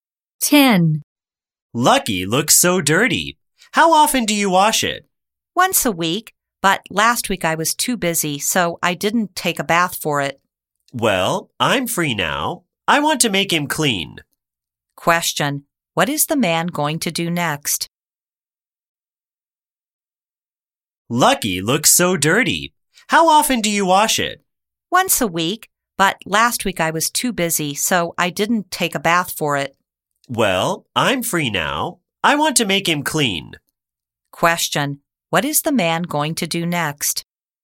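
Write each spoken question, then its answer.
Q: Question: what is the man going to do next?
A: Give Lucky a bath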